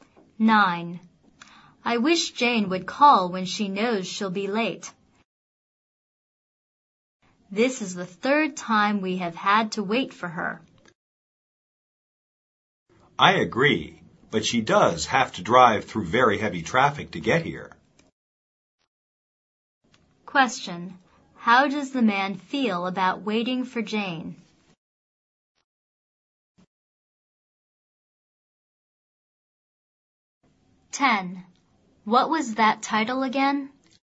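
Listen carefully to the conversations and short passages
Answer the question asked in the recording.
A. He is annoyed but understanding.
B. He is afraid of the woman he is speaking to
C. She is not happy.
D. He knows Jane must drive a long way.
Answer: A. He is annoyed but understanding.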